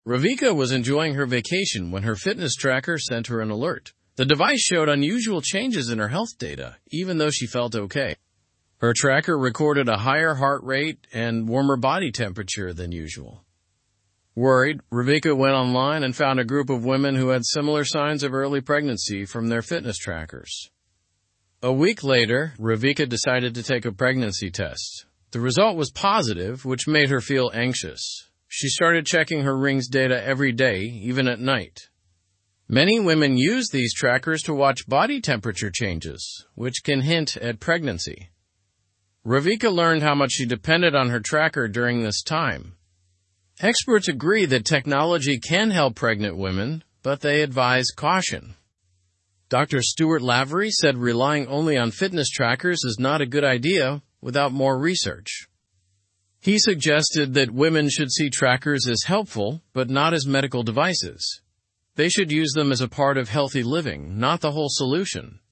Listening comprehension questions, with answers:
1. What did Ravika's fitness tracker alert her about?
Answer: Unusual changes in her health data.

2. How did Ravika feel when her tracker alerted her?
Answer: She felt fine even though the tracker showed unusual data.

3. What did Ravika find when she searched online?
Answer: She found a group of women who experienced similar early pregnancy signs through their trackers.

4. What did Ravika do a week after the tracker alert?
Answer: She took a pregnancy test.

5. How did Ravika react after her pregnancy test result?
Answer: She became anxious and checked her tracker data frequently.

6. What do experts recommend about using fitness trackers?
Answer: They recommend using trackers as a supportive tool, not as a medical solution.

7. What did Dr. Stuart Lavery warn about?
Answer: He warned against relying solely on fitness trackers without more research.

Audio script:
Ravika was enjoying her vacation when her fitness tracker sent her an alert. The device showed unusual changes in her health data, even though she felt okay. Her tracker recorded a higher heart rate and warmer body temperature than usual. Worried, Ravika went online and found a group of women who had similar signs of early pregnancy from their fitness trackers.
A week later, Ravika decided to take a pregnancy test. The result was positive, which made her feel anxious. She started checking her ring's data every day, even at night. Many women use these trackers to watch body temperature changes, which can hint at pregnancy. Ravika learned how much she depended on her tracker during this time.
Experts agree that technology can help pregnant women, but they advise caution. Dr. Stuart Lavery said relying only on fitness trackers is not a good idea without more research. He suggested that women should see trackers as helpful but not as medical devices. They should use them as a part of healthy living, not the whole solution.

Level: Level 2